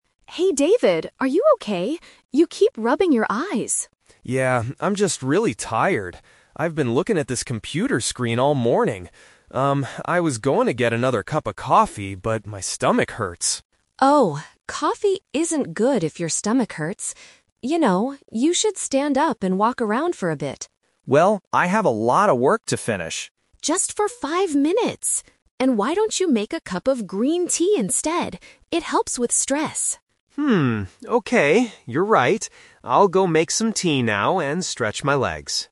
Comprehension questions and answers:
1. What did David originally plan to drink?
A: Coffee.

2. Why are David's eyes tired?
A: He has been looking at his computer.

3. What is David going to do next?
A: Walk around and make some tea.

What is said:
Sarah: Hey David, are you okay? You keep rubbing your eyes.
David: Yeah, I'm just really tired. I've been looking at this computer screen all morning. Um, I was going to get another cup of coffee, but my stomach hurts.
Sarah: Oh, coffee isn't good if your stomach hurts. You know, you should stand up and walk around for a bit.
David: Well, I have a lot of work to finish...
Sarah: Just for five minutes! And why don't you make a cup of green tea instead? It helps with stress.
David: Hmm... okay, you're right. I'll go make some tea now and stretch my legs.